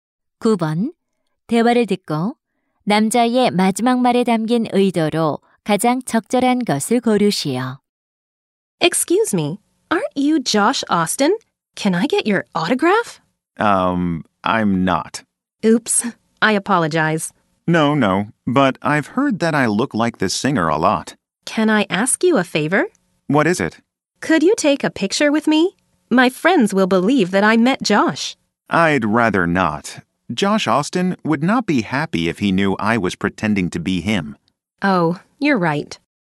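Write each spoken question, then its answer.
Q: 대화를 듣고 남자의 마지막 말에 담긴 의도로 가장 적절한 것을 고르시오.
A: 거절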